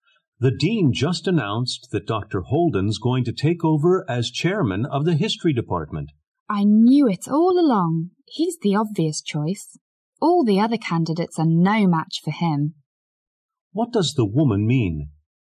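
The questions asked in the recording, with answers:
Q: What does the woman mean?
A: She expected Dr. Holden to be made chairman; he is clearly the best candidate.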